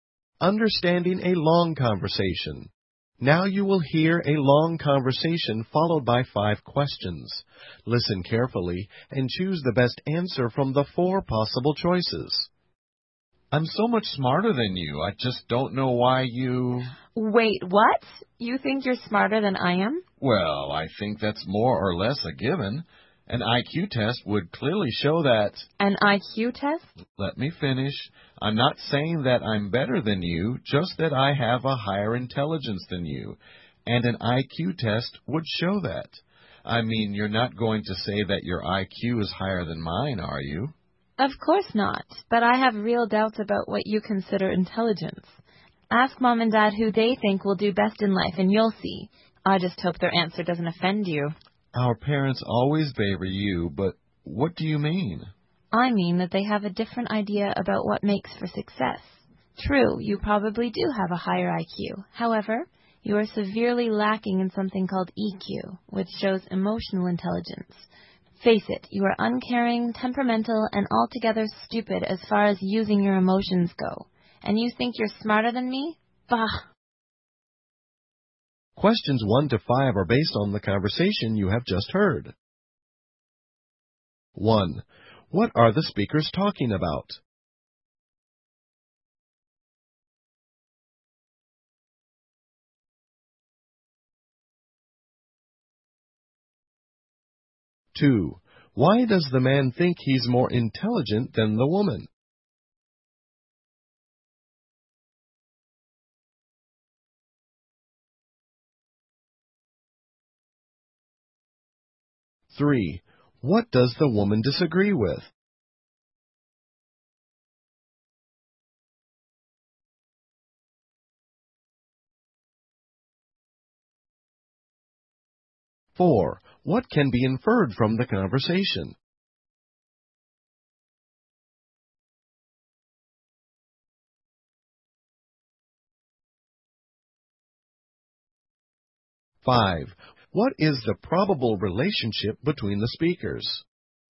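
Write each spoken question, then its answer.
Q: What are the speakers talking about?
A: IQ versus EQ and which of them is smarter

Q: Why does the man think he's more intelligent than the woman?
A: He believes an IQ test would show he has a higher IQ

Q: What does the woman disagree with?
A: His idea of what intelligence is

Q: What is the probable relationship between the speakers?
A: Brother and sister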